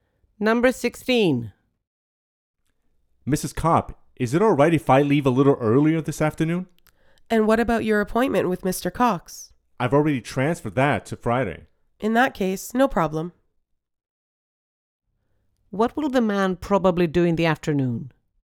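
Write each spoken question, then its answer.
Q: What will the man probably do in the afternoon?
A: Leave work early.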